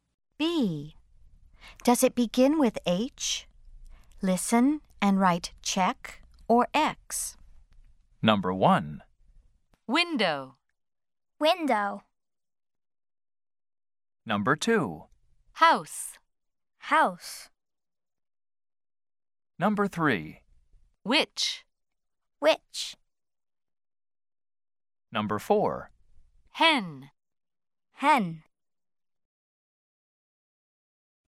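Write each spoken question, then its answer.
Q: Does it begin with H?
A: No (X): window

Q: Does it begin with H?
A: Yes (check): house

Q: Does it begin with H?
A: No (X): which

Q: Does it begin with H?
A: Yes (check): hen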